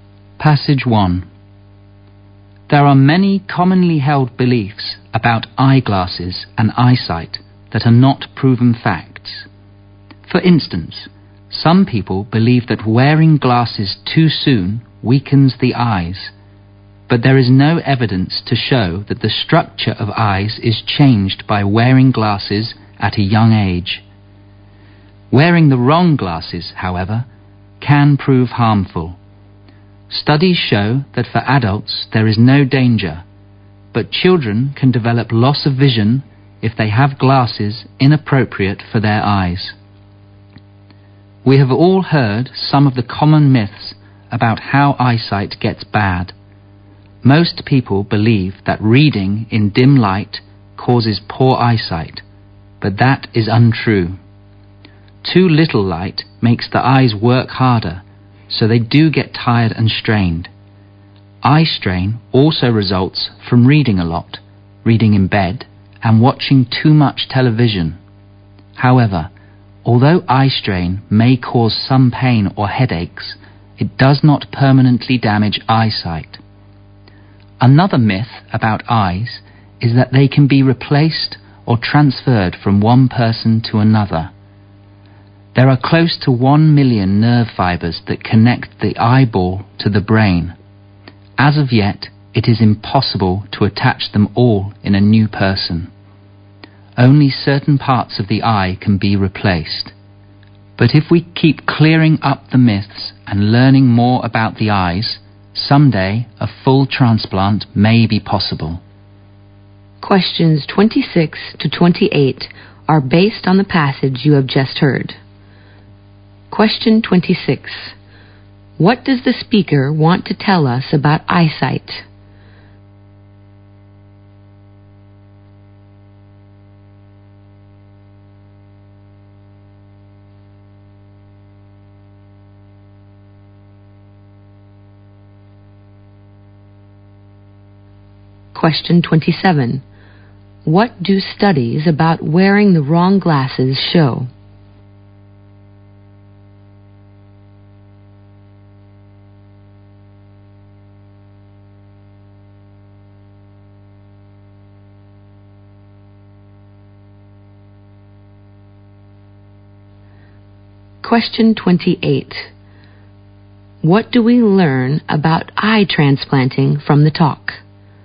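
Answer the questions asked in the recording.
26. Many common beliefs about it are myths, not facts.
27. They can harm children's eyesight but not adults'.
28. Only parts of the eye can be replaced now; a full transplant may be possible someday.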